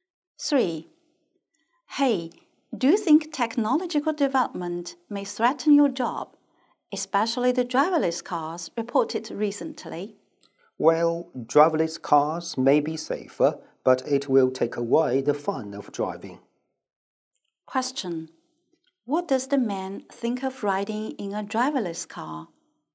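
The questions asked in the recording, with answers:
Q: What does the man think of riding in a driverless car?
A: It may be safer but takes away the fun of driving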